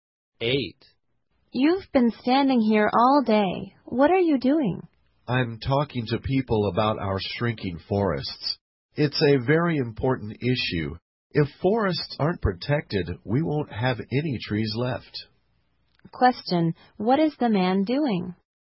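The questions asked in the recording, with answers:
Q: what is the man doing?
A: Talking to people about shrinking forests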